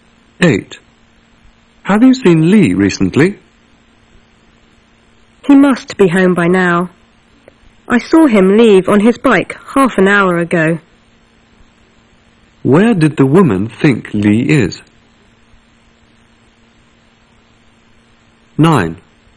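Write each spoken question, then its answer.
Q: Where did the woman think Lee is?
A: At home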